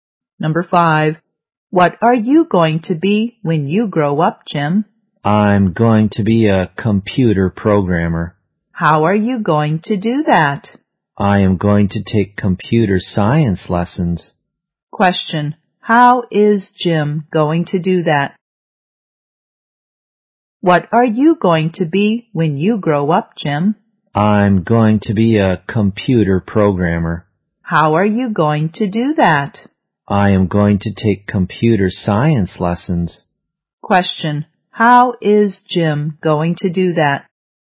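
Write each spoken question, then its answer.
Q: how is Jim going to do that?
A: By taking computer science lessons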